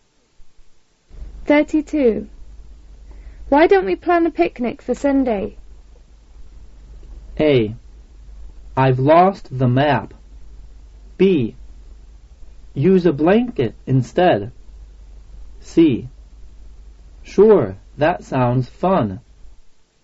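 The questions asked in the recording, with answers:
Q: Why don't we plan a picnic for Sunday?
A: C: Sure, that sounds fun.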